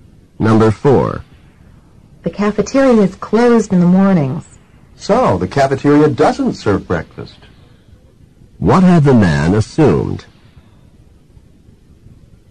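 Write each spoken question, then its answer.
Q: What had the man assumed?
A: That the cafeteria served breakfast.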